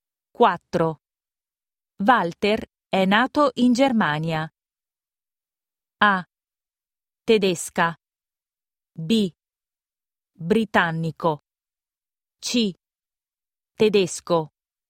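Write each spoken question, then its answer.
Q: Walter è nato in Germania.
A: C: Tedesco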